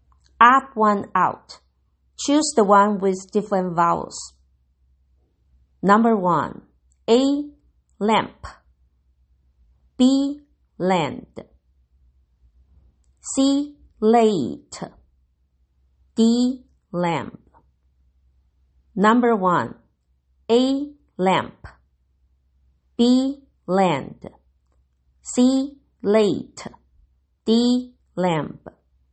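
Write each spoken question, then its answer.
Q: Choose the one with different vowels.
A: C: Late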